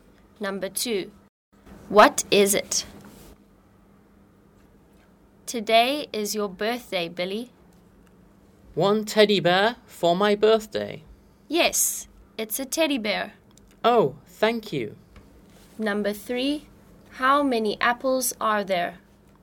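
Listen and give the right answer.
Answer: A teddy bear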